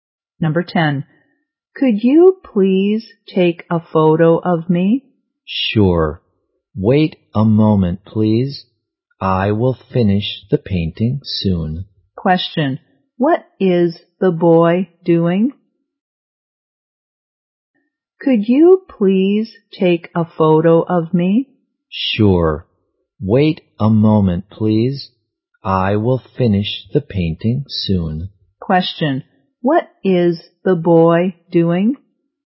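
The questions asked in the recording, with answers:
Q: what is the boy doing?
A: Painting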